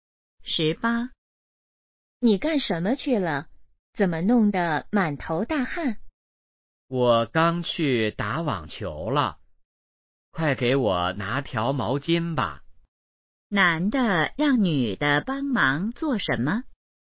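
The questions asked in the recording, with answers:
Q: 男的让女的帮忙做什么?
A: 拿毛巾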